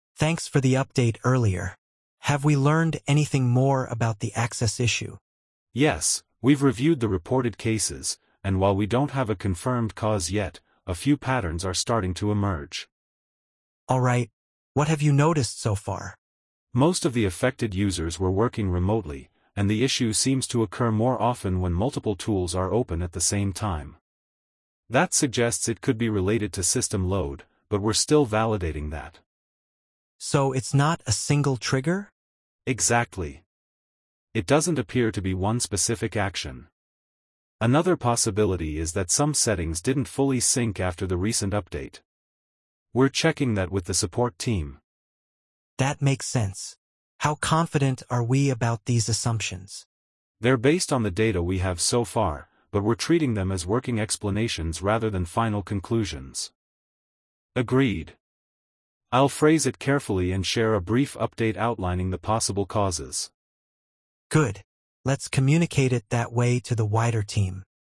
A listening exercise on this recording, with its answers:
Complete the phrases as you listen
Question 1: Most of the affected users were working ______.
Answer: remotely

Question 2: The issue seems to occur more often when ______ tools are open at the same time.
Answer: multiple

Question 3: That suggests it could be related to system ______.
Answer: load

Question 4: Another possibility is that some settings didn't fully ______ after the recent update.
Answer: sync

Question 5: How confident are we about these ______?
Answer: assumptions

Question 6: We're treating them as working explanations rather than final ______.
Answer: conclusions

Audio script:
"Thanks for the update earlier. Have we learned anything more about the access issue?"
"Yes, we've reviewed the reported cases, and while we don't have a confirmed cause yet, a few patterns are starting to emerge."
"Alright. What have you noticed so far?"
"Most of the affected users were working remotely, and the issue seems to occur more often when multiple tools are open at the same time. That suggests it could be related to system load, but we're still validating that."
"So it's not a single trigger?"
"Exactly. It doesn't appear to be one specific action. Another possibility is that some settings didn't fully sync after the recent update. We're checking that with the support team."
"That makes sense. How confident are we about these assumptions?"
"They're based on the data we have so far, but we're treating them as working explanations rather than final conclusions."
I'll phrase it carefully and share a brief update outlining the possible causes."